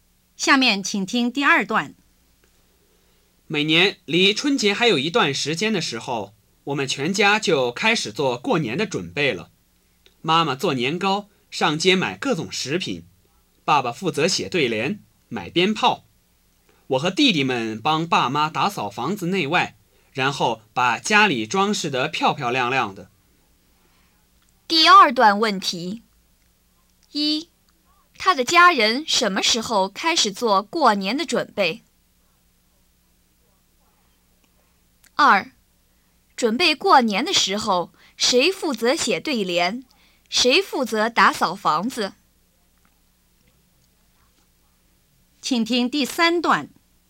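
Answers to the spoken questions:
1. 离春节还有一段时间的时候
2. 爸爸写对联,他和弟弟们打扫房子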